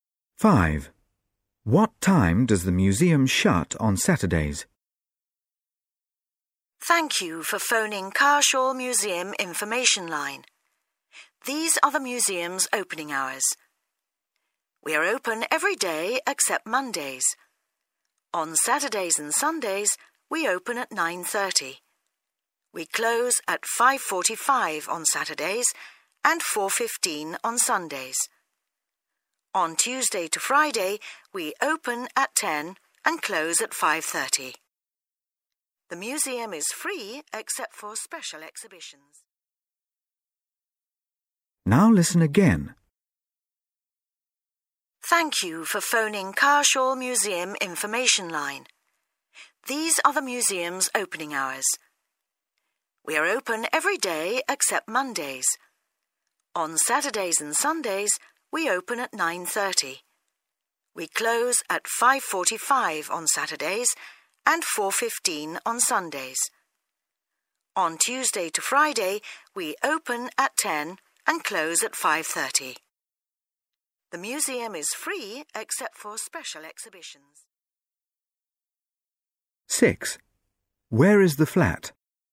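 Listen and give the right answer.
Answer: 5:45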